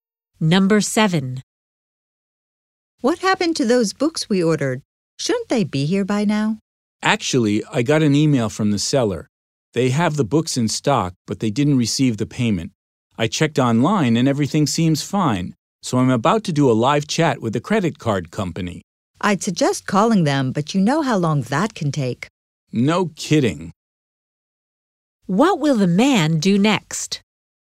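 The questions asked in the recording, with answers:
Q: What will the man do next?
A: Do a live chat with the credit card company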